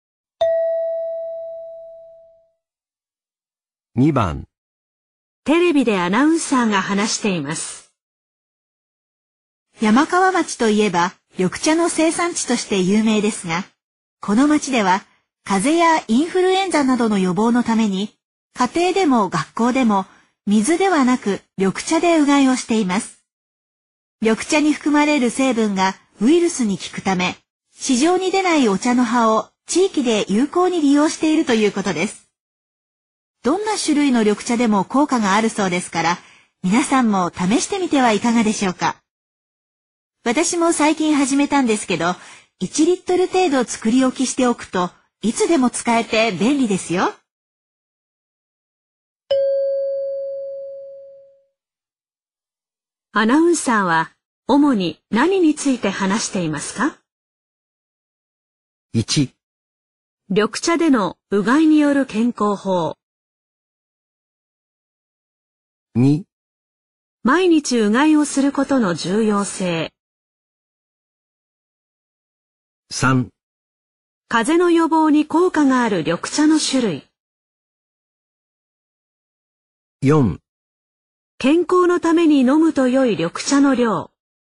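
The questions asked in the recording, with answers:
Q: アナウンサーは主に何について話していますか?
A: 1: 緑茶でのうがいによる健康法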